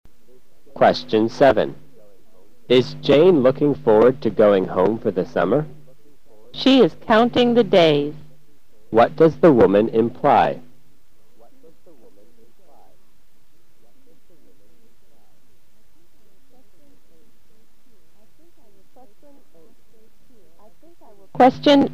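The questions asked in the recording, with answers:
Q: What does the woman imply?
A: Jane is very eager to go home for the summer.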